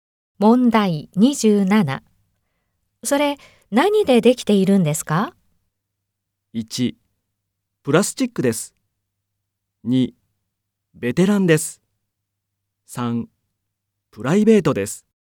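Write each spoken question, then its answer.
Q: それ、何でできているんですか?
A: 1: プラスチックです。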